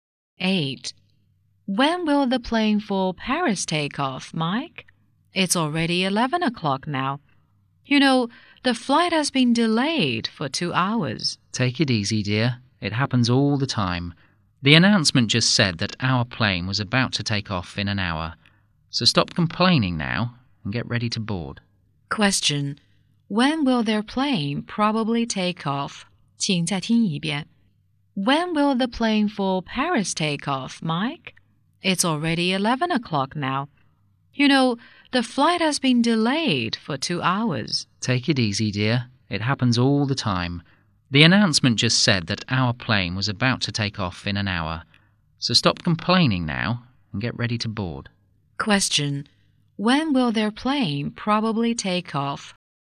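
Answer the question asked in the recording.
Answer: At 12 o'clock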